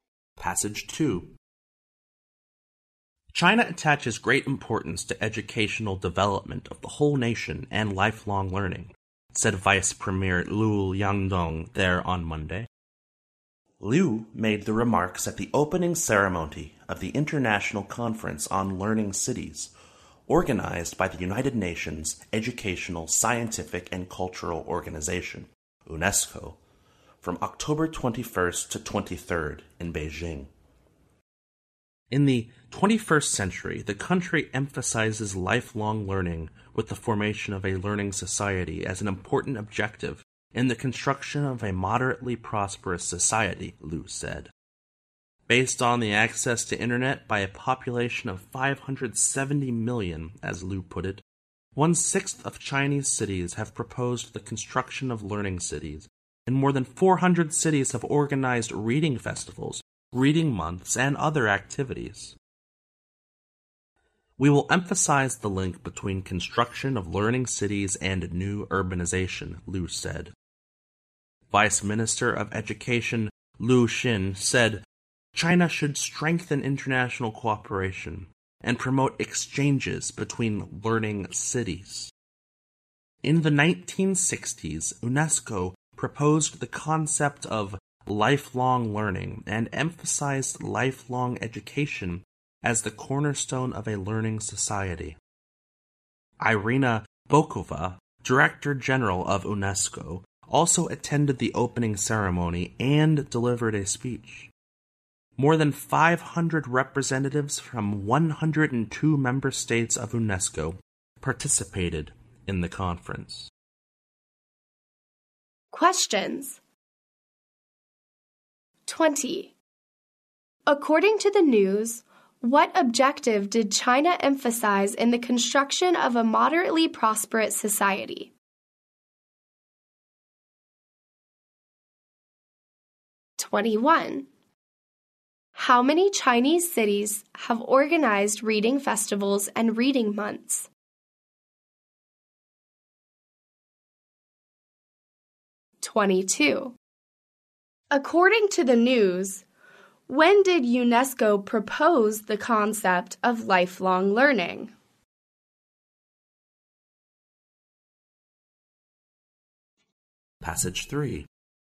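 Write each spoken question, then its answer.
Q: According to the news, what objective did China emphasize in the construction of a moderately prosperous society?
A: The formation of a learning society

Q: How many Chinese cities have organized reading festivals and reading months?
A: More than 400

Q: According to the news, when did UNESCO propose the concept of lifelong learning?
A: In the 1960s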